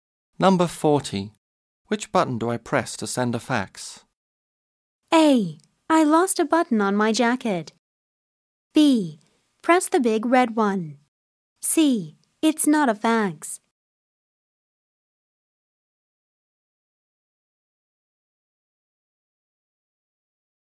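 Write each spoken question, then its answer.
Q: Which button do I press to send a fax?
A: B: Press the big red one.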